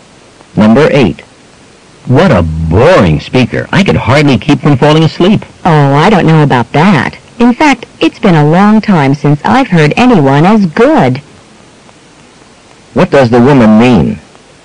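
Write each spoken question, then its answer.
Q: What does the woman mean?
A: She thought the speaker was very good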